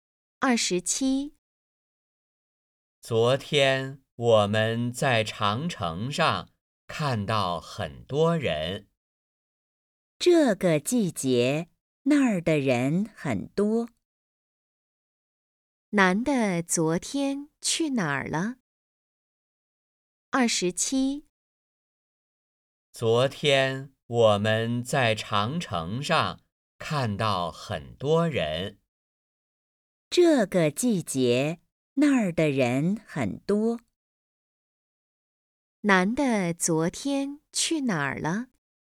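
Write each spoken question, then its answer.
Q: 男的昨天去哪儿了?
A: 长城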